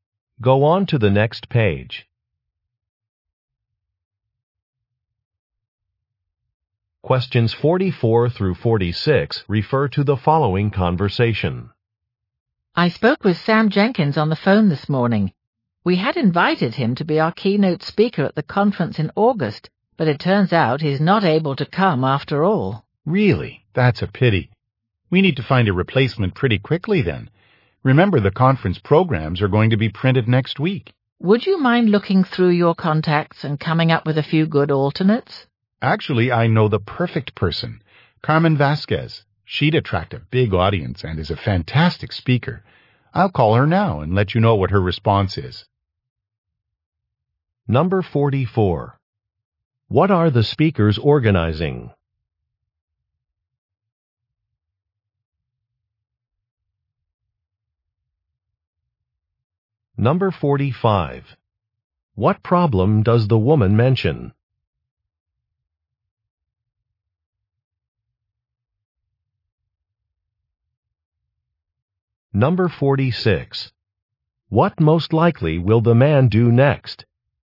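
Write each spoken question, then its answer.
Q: What are the speakers organizing?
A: A conference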